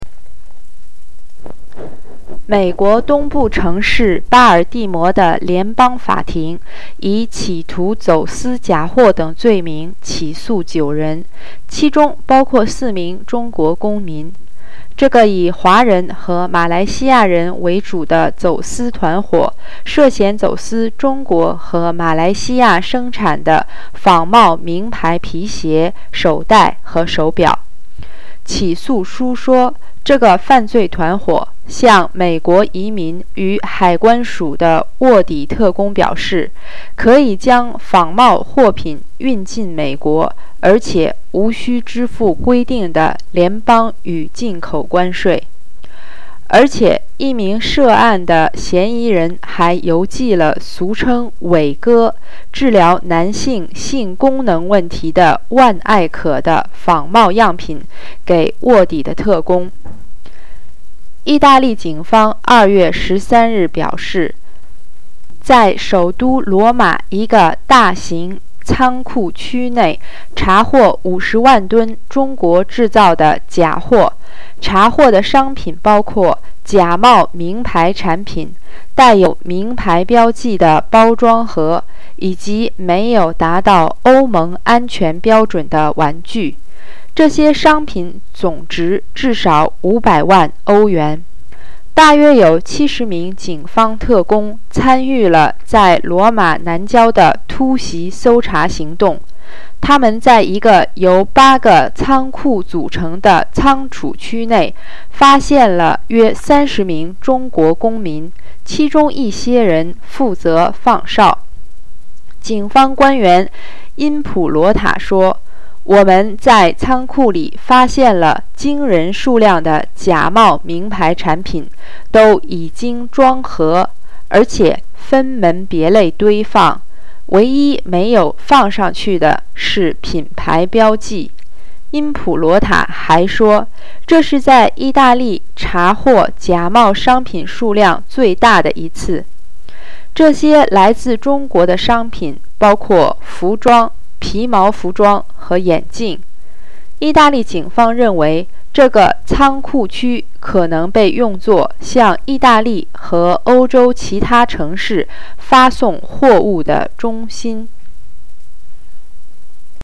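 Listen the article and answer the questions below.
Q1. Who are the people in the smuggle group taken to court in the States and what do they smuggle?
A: Mainly Chinese and Malaysians (nine people, four Chinese citizens); they smuggled fake brand-name shoes, handbags and watches made in China and Malaysia

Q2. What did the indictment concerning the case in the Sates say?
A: The group told undercover Customs agents they could bring fake goods into the US without paying federal and import tariffs, and one suspect mailed fake Viagra samples to an agent

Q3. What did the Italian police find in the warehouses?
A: About 30 Chinese citizens and huge amounts of Chinese-made fakes: fake brand products, branded packaging boxes and unsafe toys, worth at least 5 million euros

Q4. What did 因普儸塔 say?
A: They found an astonishing amount of fake brand products, boxed and sorted, lacking only the brand labels; it was the largest seizure of fake goods in Italy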